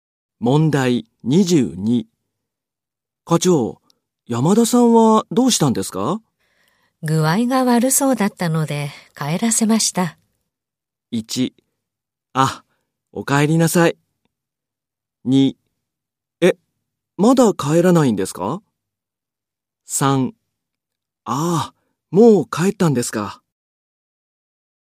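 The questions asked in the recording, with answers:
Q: 山田さんはどうしたんですか?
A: 3: ああ、もう帰ったんですか。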